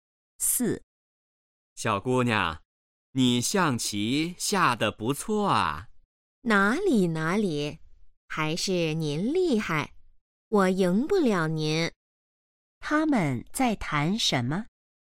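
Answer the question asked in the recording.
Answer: 下象棋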